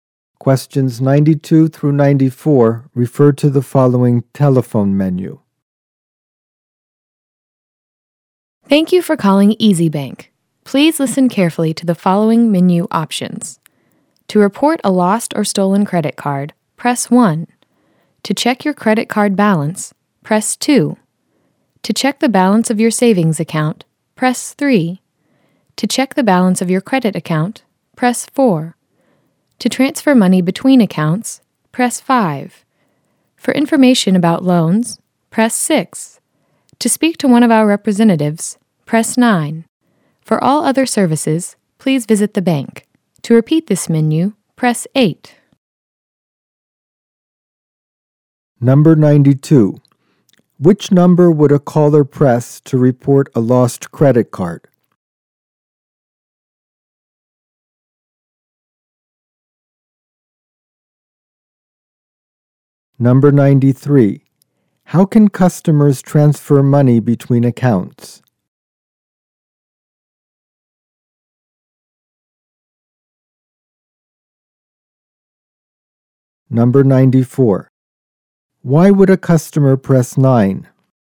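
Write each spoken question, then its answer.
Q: How can customers transfer money between accounts?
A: By pressing 5.

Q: Why would a customer press 9?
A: To speak to a representative.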